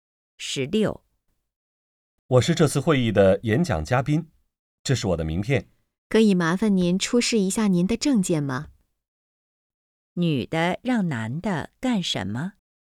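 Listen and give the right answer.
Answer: 出示证件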